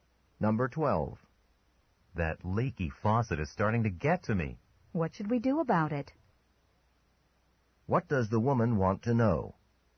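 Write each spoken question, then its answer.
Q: What does the woman want to know?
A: What to do about the leaky faucet.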